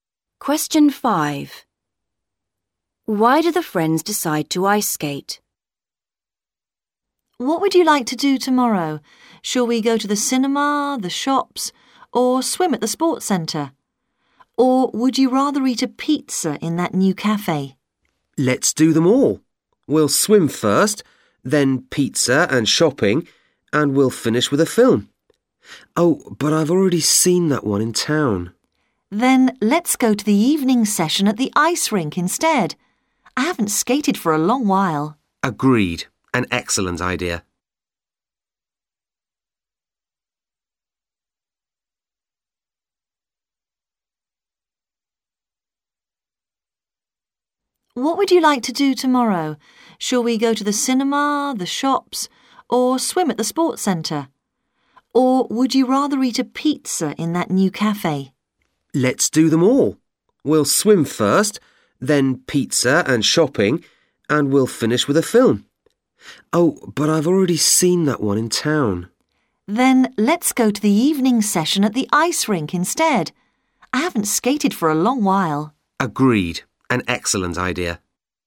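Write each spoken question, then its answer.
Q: Why do the friends decide to ice skate?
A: One of them has already seen the film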